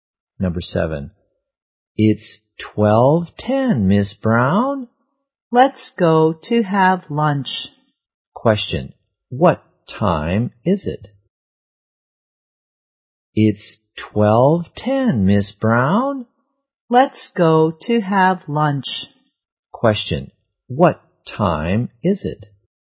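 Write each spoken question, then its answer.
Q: what time is it?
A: 12:10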